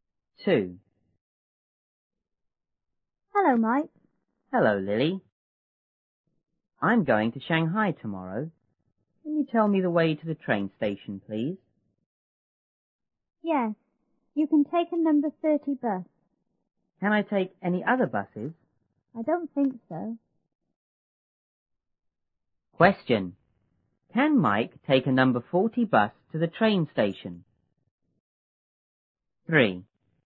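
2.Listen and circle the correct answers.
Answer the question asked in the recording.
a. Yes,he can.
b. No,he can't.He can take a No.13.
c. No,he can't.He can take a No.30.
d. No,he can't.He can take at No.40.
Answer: c. No,he can't.He can take a No.30.

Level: 初中英语广州版1B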